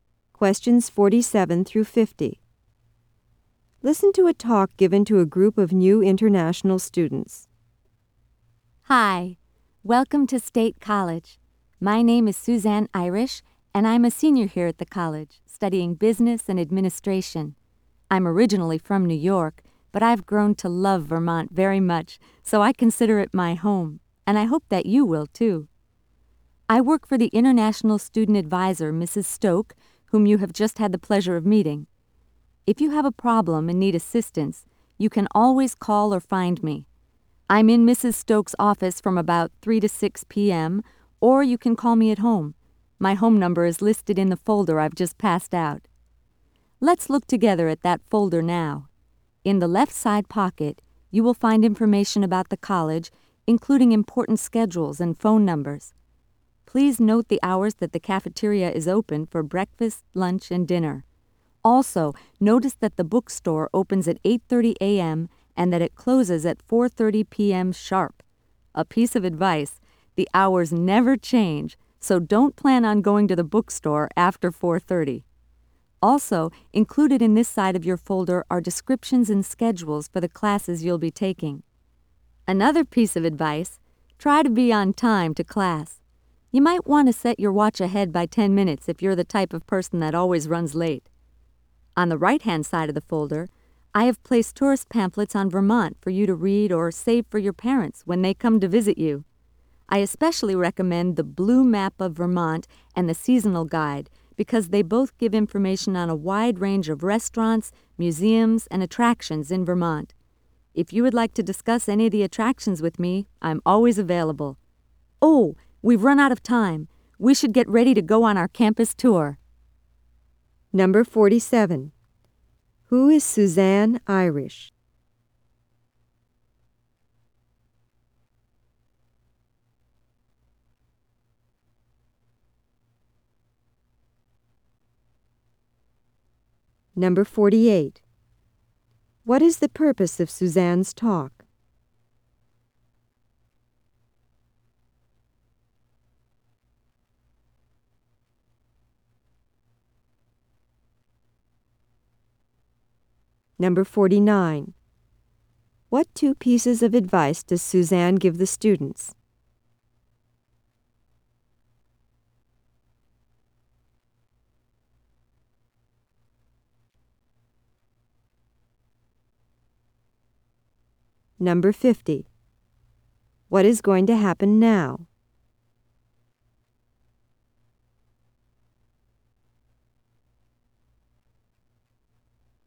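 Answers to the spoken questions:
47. A senior student who works for the international student advisor
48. To welcome new international students and explain the folder of information
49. Don't go to the bookstore after 4:30 and be on time to class
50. They will go on a campus tour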